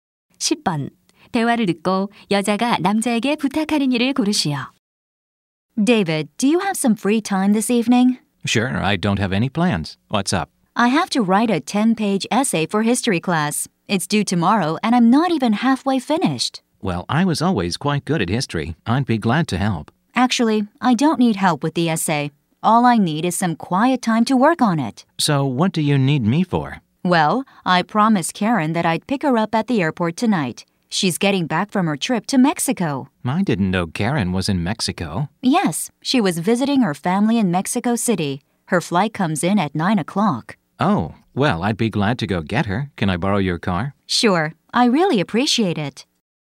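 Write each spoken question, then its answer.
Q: 대화를 듣고 여자가 남자에게 부탁하는 일을 고르시오.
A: 공항에 Karen 마중 나가기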